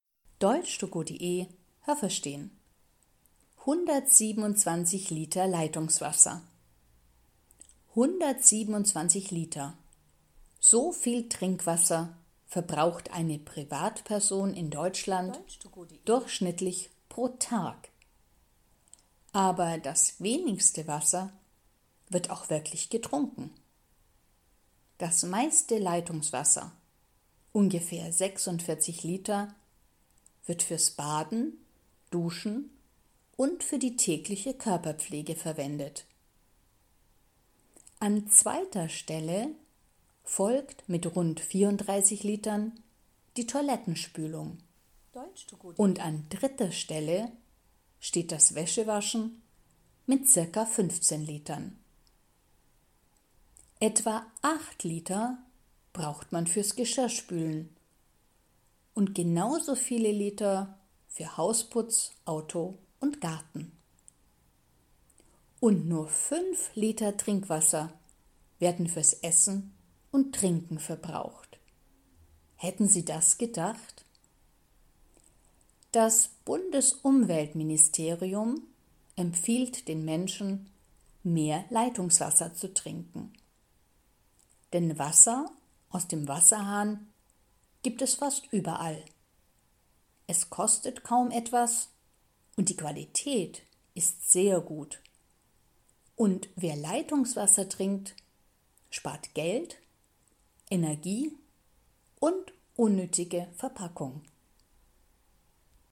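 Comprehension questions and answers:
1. Eine Privatperson in Deutschland verbraucht pro Monat 127 Liter Trinkwasser.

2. Das meiste Wasser wird getrunken.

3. 34 Liter Leitungswasser verbraucht jeder pro Tag für die Toilettenspülung.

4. Etwa 8 Liter braucht man täglich nur fürs Geschirrspülen.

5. Fürs Essen und Trinken werden täglich 15 Liter Trinkwasser verbraucht.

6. Das Leitungswasser in Deutschland ist nicht teuer und hat eine sehr gute Qualität.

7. Wenn man Leitungswasser trinkt, dann ist das nicht gut für die Umwelt.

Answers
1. falsch
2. falsch
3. richtig
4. richtig
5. falsch
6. richtig
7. falsch

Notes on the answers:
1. Sie verbraucht 127 Liter pro Tag.
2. Das meiste Wasser wird fürs Baden, Duschen und für die tägliche Körperpflege verwendet.
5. Es sind nur 5 Liter.
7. Im Gegenteil, das ist sehr umweltfreundlich. Wenn man Wasser direkt aus dem Wasserhahn trinkt, fällt z.B. 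die Verpackung weg.

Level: A (einfach)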